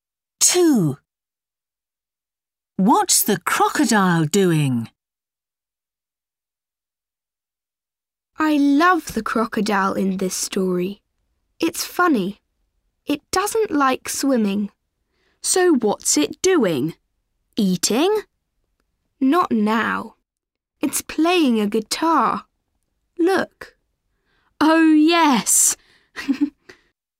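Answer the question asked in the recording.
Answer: Playing a guitar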